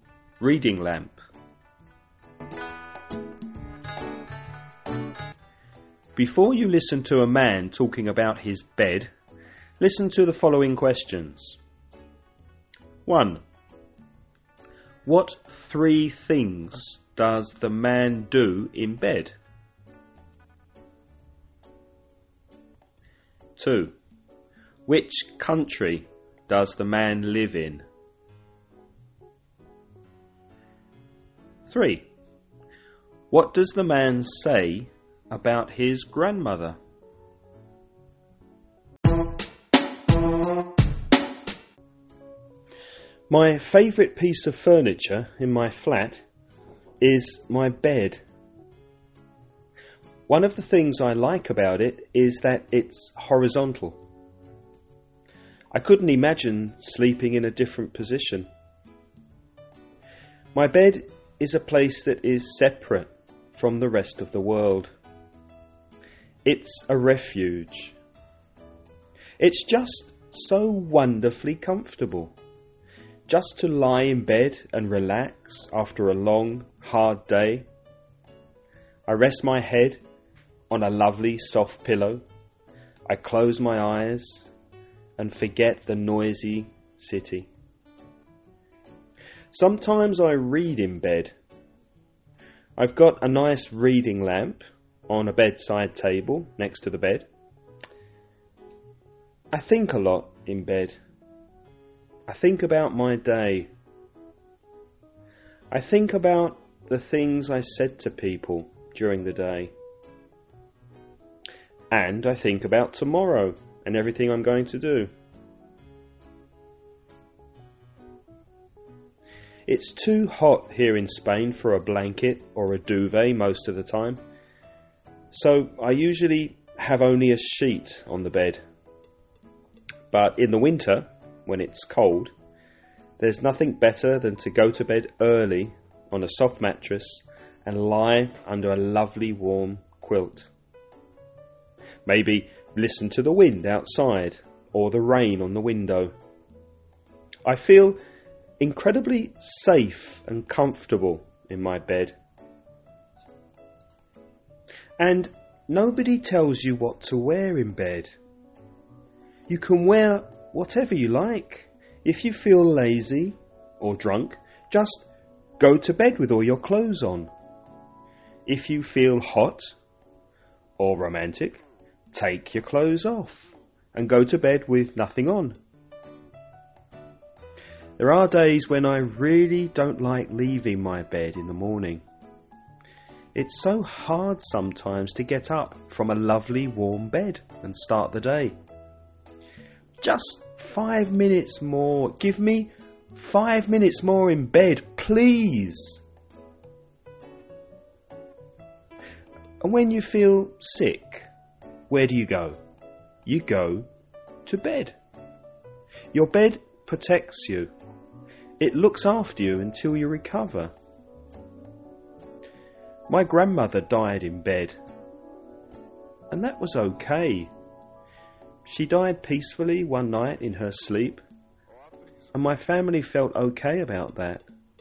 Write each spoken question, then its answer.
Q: What three things does the man do in bed?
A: He thinks, reads, and relaxes.

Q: Which country does the man live in?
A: Spain.

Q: What does the man say about his grandmother?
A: She died in bed.